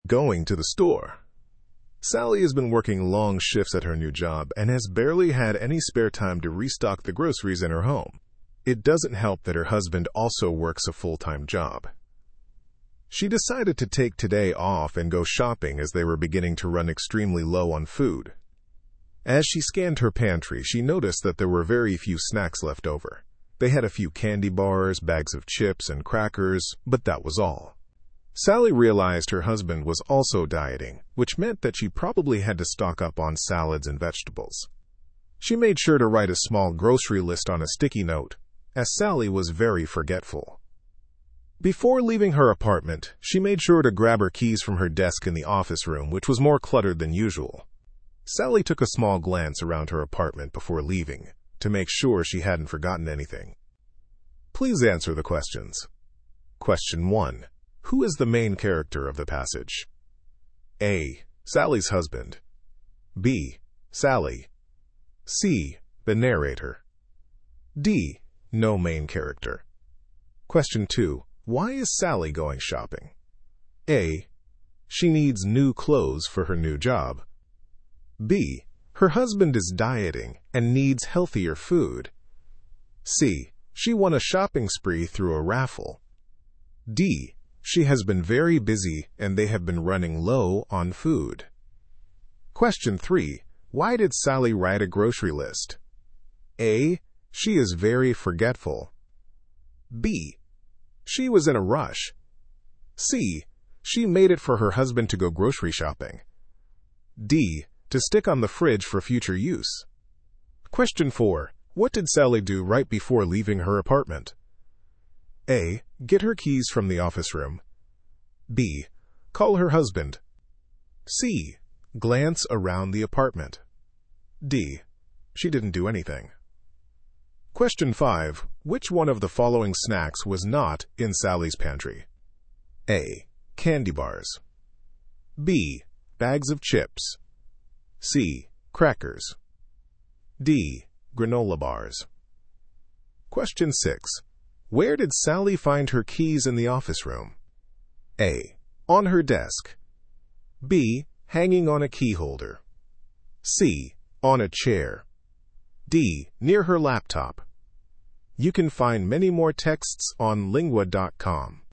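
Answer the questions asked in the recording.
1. B: Sally.
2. D: She has been very busy and they have been running low on food.
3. A: She is very forgetful.
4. C: Glance around the apartment.
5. D: Granola bars.
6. A: On her desk.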